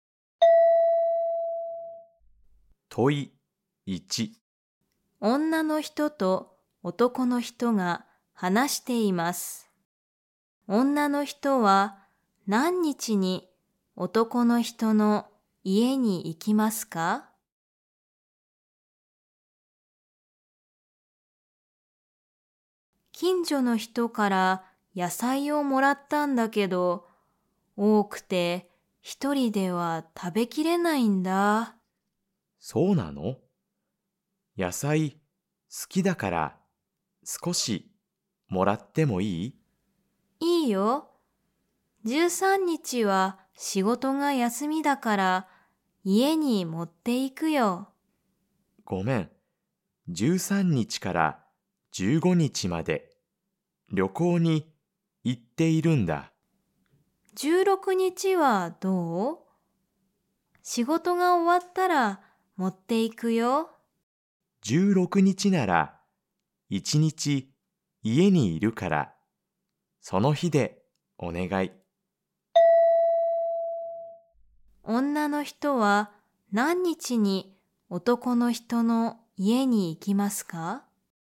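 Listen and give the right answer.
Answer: 16日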